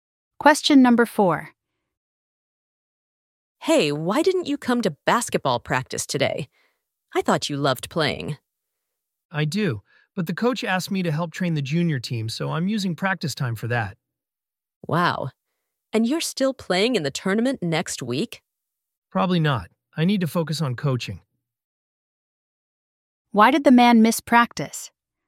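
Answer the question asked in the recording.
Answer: He was helping train the junior team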